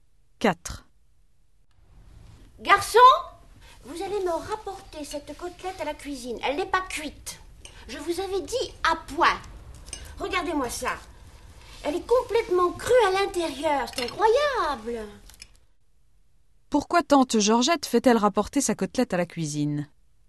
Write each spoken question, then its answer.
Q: Pourquoi tante Georgette fait-elle rapporter sa côtelette à la cuisine?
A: Parce qu'elle n'est pas cuite.